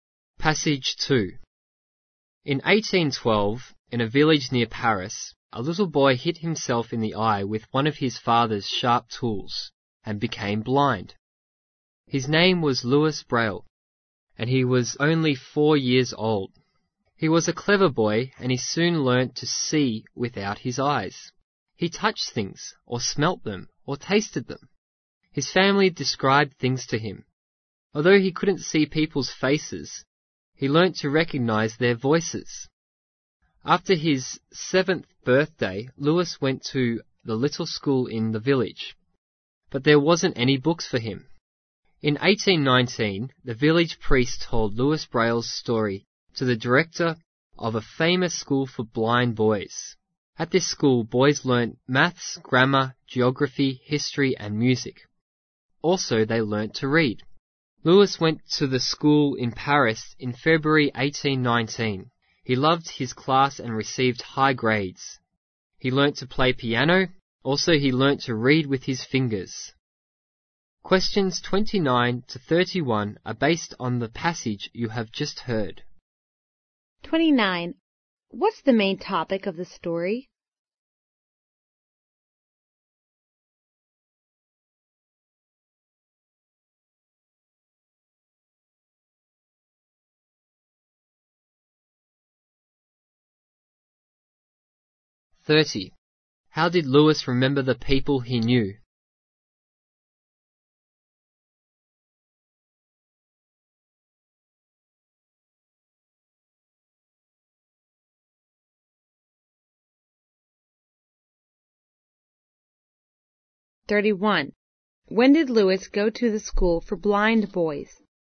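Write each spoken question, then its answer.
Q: What's the main topic of the story?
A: Louis Braille's childhood

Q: How did Louis remember the people he knew?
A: By their voices

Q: When did Louis go to the school for blind boys?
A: In February 1819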